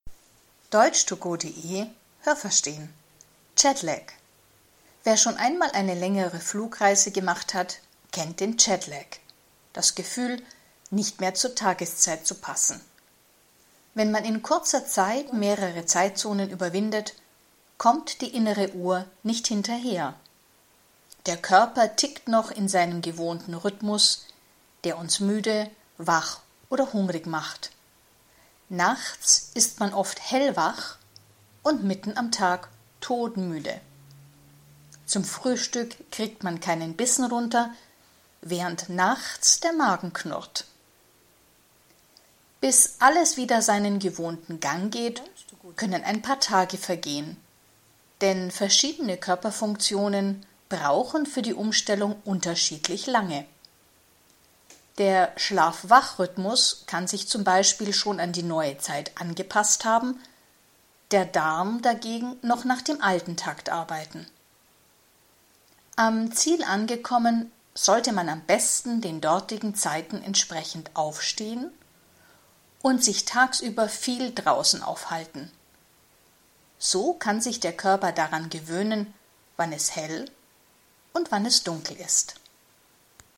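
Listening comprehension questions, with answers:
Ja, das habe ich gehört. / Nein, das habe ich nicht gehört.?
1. Bei jeder Flugreise bekommt man einen Jetlag.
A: Nein, das habe ich nicht gehört.

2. Bei einem Jetlag kann man oft nachts nicht schlafen.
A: Ja, das habe ich gehört.

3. Bei einem Jetlag ist man oft nachts hungrig.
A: Ja, das habe ich gehört.

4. Es dauert zwei Tage, bis man den Jetlag überwunden hat.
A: Nein, das habe ich nicht gehört.

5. Alle Körperfunktionen brauchen gleich lang, um sich an die neue Zeit anzupassen.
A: Nein, das habe ich nicht gehört.

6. Am Ziel angekommen, sollte man am besten dann aufstehen, wann es dort üblich ist.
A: Ja, das habe ich gehört.

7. Am Ziel angekommen, sollte man sich nicht zu lange draußen aufhalten.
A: Nein, das habe ich nicht gehört.

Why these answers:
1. Das ist bei längeren Flugreisen der Fall, wenn man mehrere Zeitzonen überwindet.
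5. Die verschiedenen Körperfunktionen brauchen unterschiedlich lang.

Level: B1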